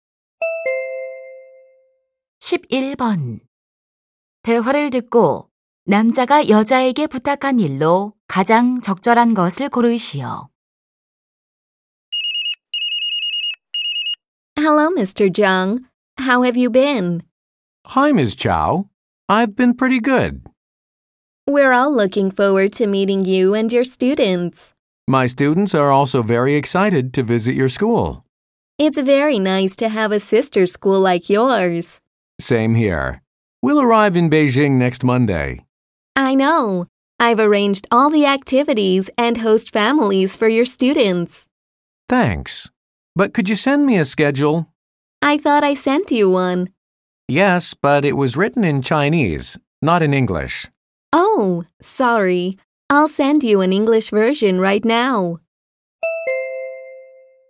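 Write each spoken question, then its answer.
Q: 대화를 듣고 남자가 여자에게 부탁한 일로 가장 적절한 것을 고르시오.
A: 영어로 된 일정표 보내주기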